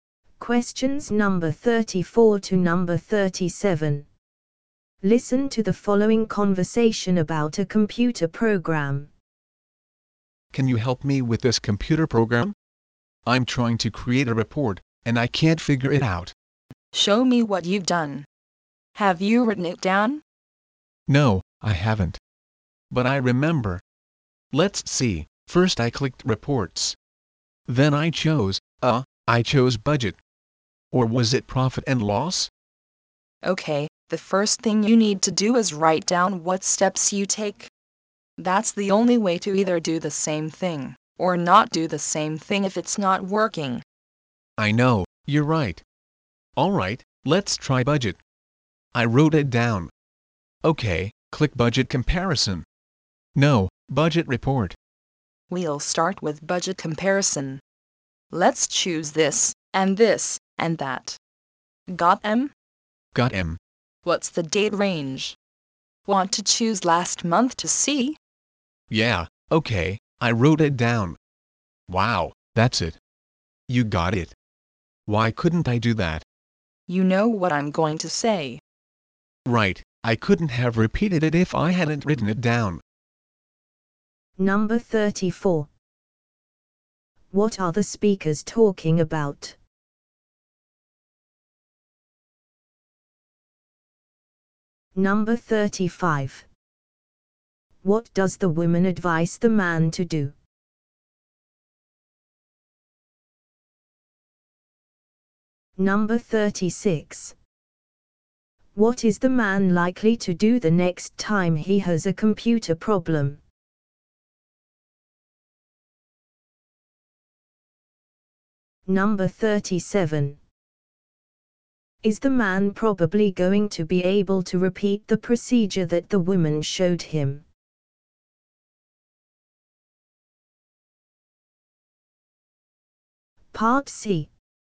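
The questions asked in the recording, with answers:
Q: What are the speakers talking about?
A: How to create a report with a computer program.

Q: What does the woman advise the man to do?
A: Write down the steps he takes.

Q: Is the man probably going to be able to repeat the procedure that the woman showed him?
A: Yes, because he wrote the steps down.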